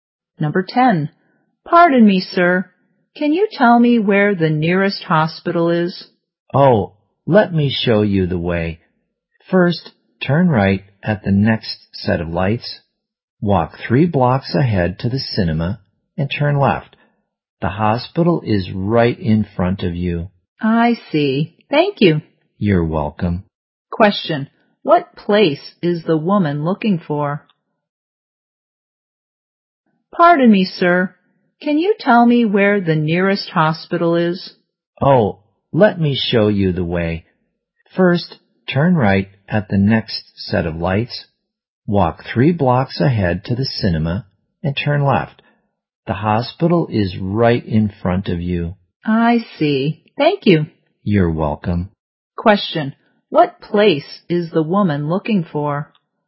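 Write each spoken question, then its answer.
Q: Question. What place is the woman looking for?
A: The nearest hospital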